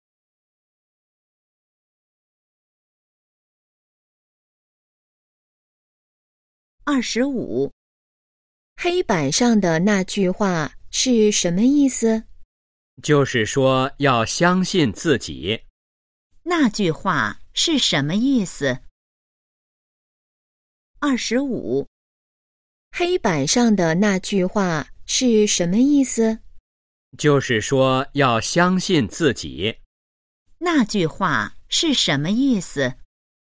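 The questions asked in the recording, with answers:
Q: 那句话是什么意思?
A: 要相信自己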